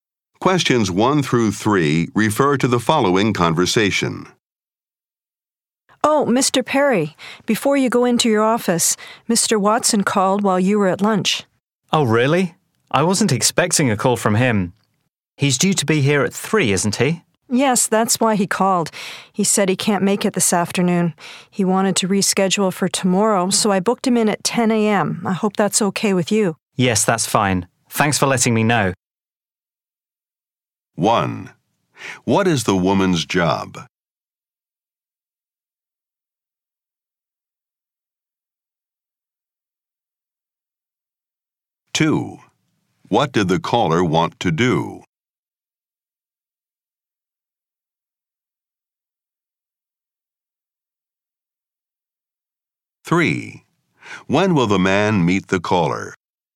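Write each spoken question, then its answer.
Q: What did the caller want to do?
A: Reschedule the appointment

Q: When will the man meet the caller?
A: Tomorrow at 10 a.m.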